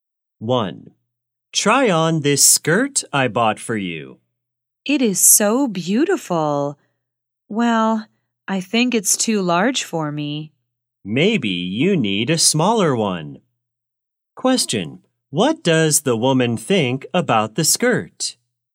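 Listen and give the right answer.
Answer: It's too large for her.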